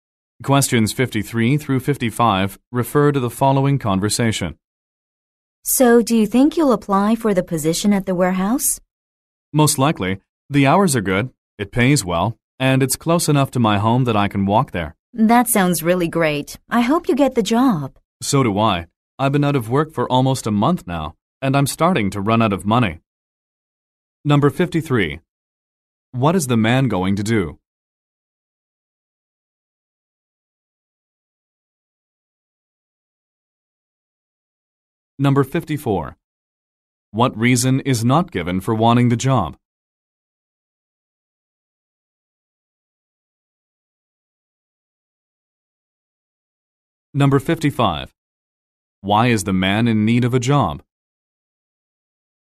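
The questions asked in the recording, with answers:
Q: What is the man going to do?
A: Apply for the warehouse job

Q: Why is the man in need of a job?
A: He has been out of work for a month and is running out of money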